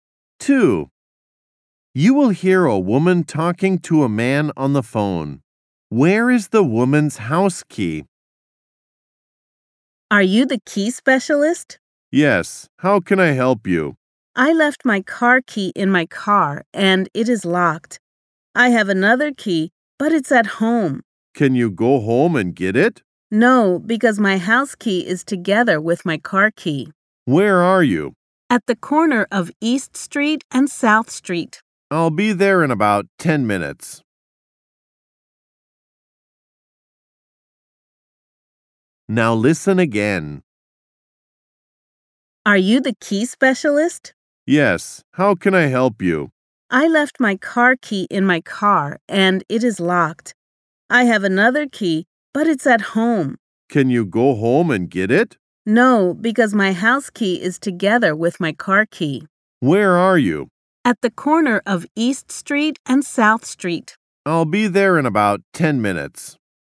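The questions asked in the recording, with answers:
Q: Where is the woman's house key?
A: In her locked car, with her car key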